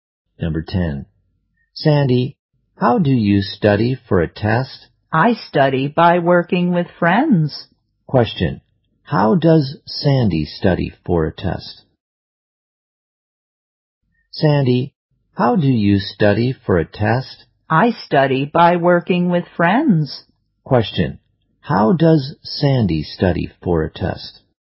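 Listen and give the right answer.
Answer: By working with friends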